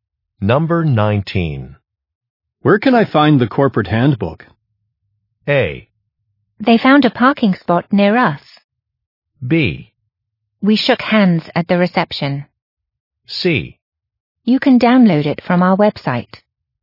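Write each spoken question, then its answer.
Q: Where can I find the corporate handbook?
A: C: You can download it from our website.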